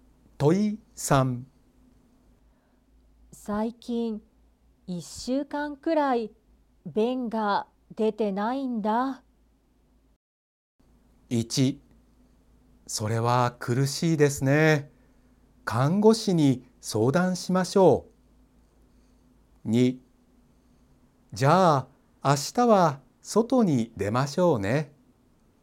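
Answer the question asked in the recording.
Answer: 1: それは苦しいですね。看護師に相談しましょう。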